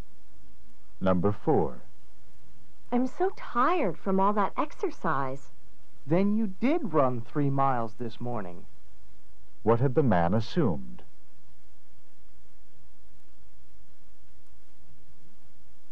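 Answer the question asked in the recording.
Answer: That the woman hadn't run 3 miles.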